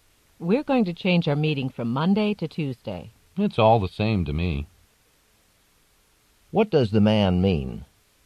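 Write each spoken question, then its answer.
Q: What does the man mean?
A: He doesn't mind whether the meeting is on Monday or Tuesday.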